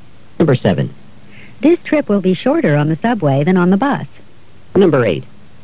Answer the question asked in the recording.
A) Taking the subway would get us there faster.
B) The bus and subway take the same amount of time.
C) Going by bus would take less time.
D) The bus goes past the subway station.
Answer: A) Taking the subway would get us there faster.

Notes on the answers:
This trip will be shorter on the subway than on the bus.

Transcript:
6. He himself didn't know what to do.
7. This trip will be shorter on the subway than on the bus.